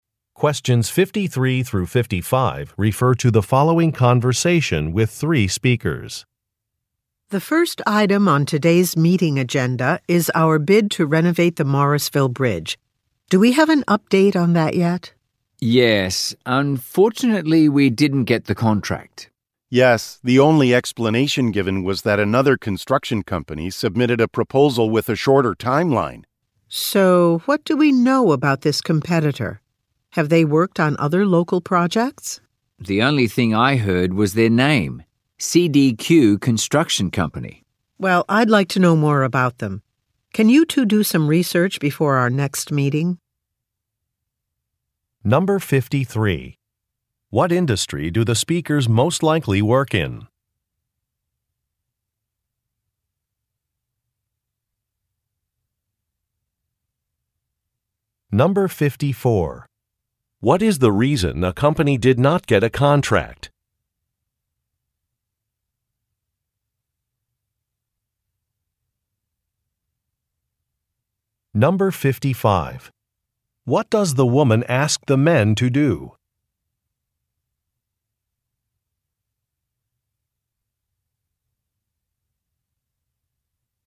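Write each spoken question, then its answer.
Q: What industry do the speakers most likely work in?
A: Construction

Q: What is the reason a company did not get a contract?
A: Another company proposed a shorter timeline

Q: What does the woman ask the men to do?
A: Research the competitor, CDQ Construction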